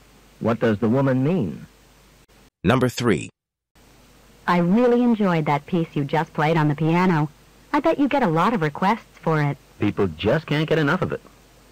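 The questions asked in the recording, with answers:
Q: What does the man mean?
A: The piece is very popular; people often request it.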